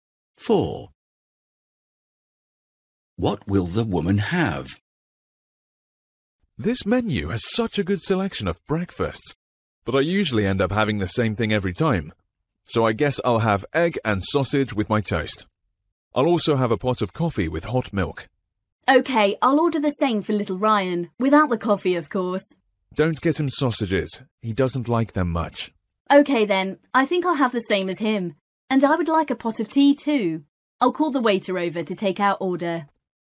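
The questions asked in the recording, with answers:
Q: What will the woman have?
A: Egg and toast with a pot of tea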